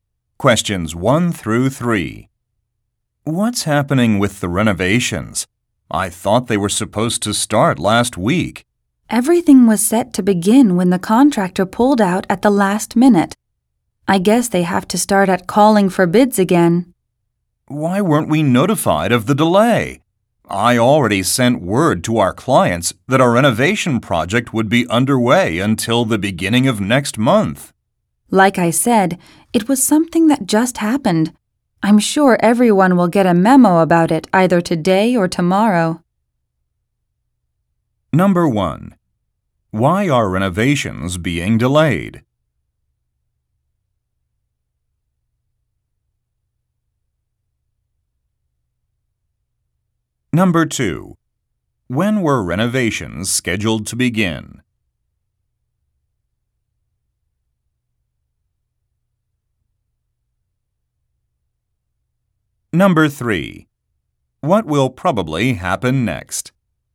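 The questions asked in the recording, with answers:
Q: Why are renovations being delayed?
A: The contractor pulled out at the last minute.

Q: When were renovations scheduled to begin?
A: Last week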